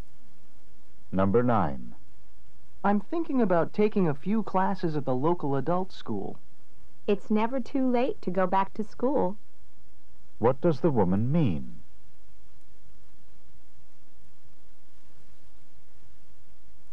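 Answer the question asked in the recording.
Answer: It's a good idea; he isn't too old to go back to school.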